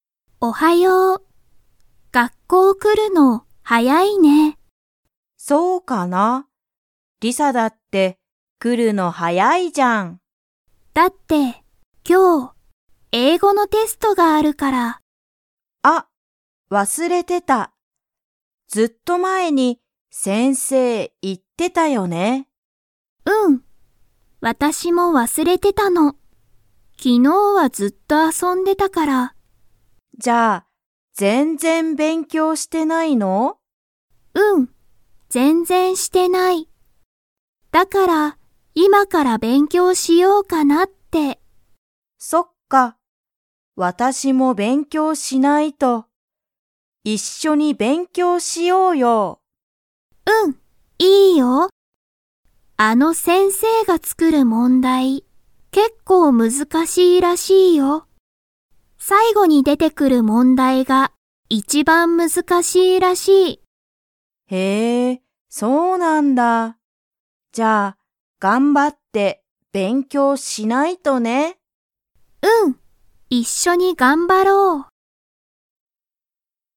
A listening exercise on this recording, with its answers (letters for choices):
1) カナはなんで早(はや)く学校(がっこう)に来(き)ましたか?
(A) 最後さいごの問題もんだいが一番難いちばんむずかしいから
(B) 先生(せんせい)と話(はな)したいから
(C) 一緒(いっしょ)に遊(あそ)びたいから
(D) 英語えいごのテストの勉強べんきょうをしたいから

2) リサとカナは一緒(いっしょ)に勉強べんきょう____。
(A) する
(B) しない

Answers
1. D
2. A